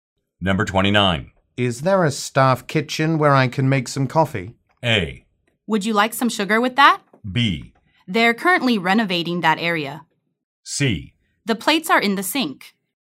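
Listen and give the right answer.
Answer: B: They're currently renovating that area.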